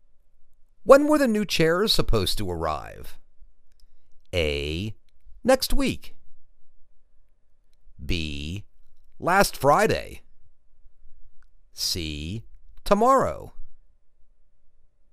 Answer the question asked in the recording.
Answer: Last Friday